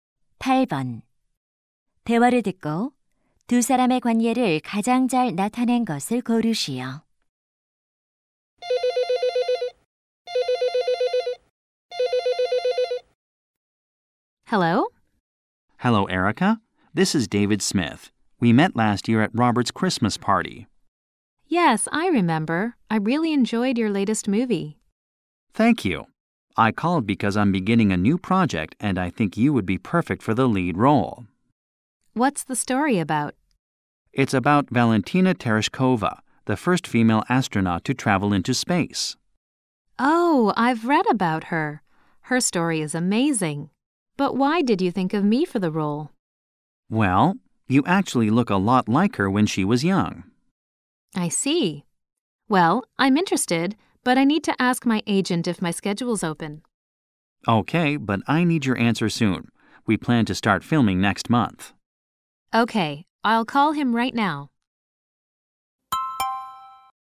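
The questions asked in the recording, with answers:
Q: 대화를 듣고 두 사람의 관계를 가장 잘 나타낸 것을 고르시오.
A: 영화감독 - 배우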